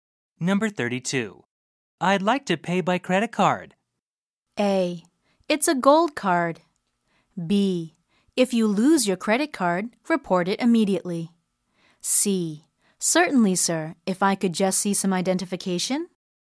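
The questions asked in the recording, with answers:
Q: I'd like to pay by credit card.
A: C: Certainly, sir, if I could just see some identification.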